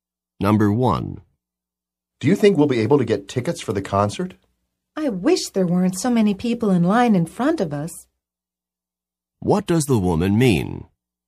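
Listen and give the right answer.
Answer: There are many people in line in front of them.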